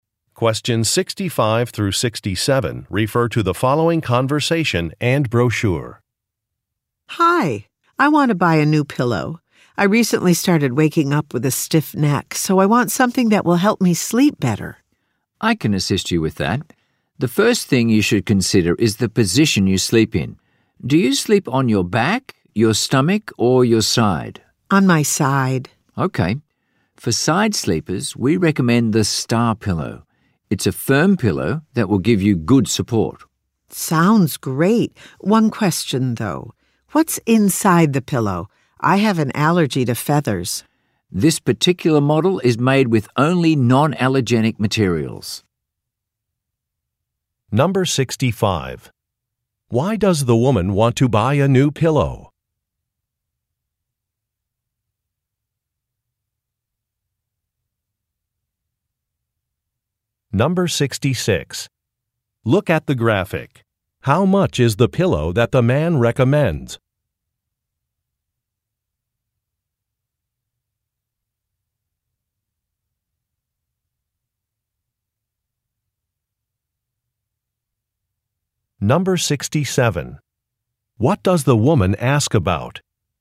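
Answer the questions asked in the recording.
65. She has been waking up with a stiff neck.
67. What is inside the pillow (its materials)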